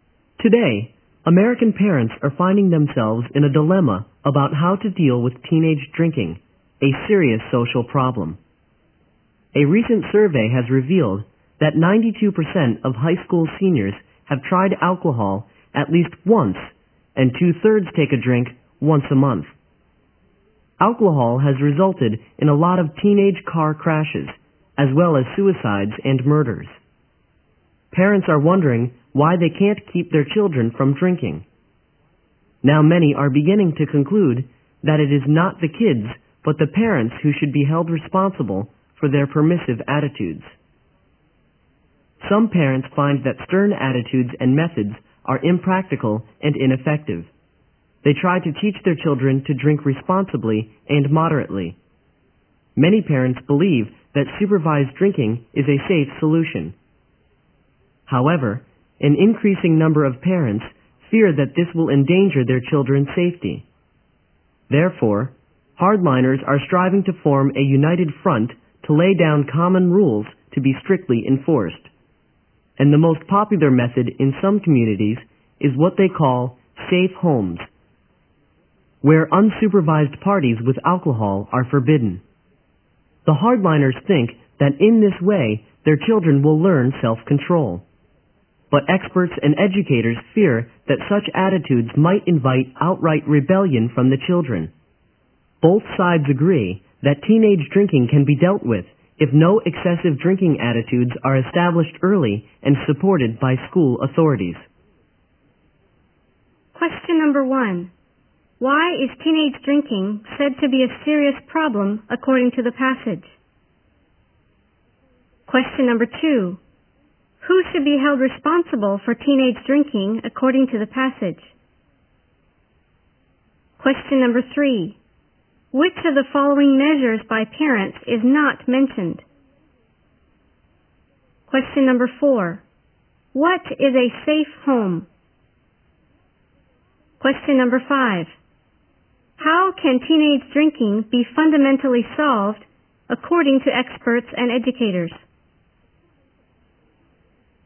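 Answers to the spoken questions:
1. It has led to many teenage car crashes, suicides and murders
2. The parents, because of their permissive attitudes
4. A home where unsupervised parties with alcohol are forbidden
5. By establishing no-excessive-drinking attitudes early, supported by school authorities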